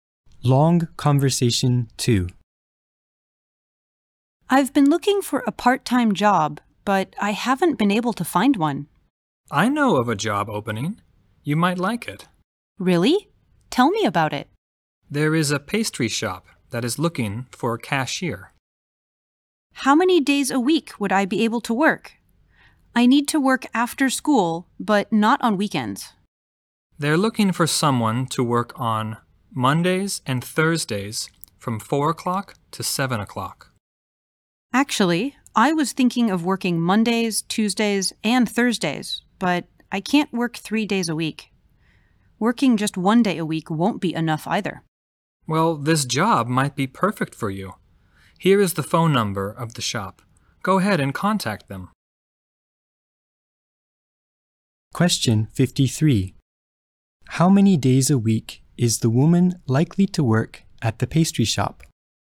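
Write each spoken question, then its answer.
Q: How many days a week is the woman likely to work at the pastry shop?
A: Two days (Mondays and Thursdays)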